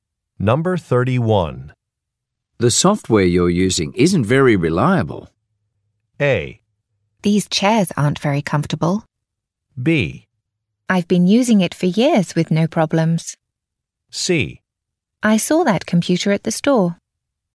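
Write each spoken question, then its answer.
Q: The software you're using isn't very reliable.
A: B: I've been using it for years with no problems.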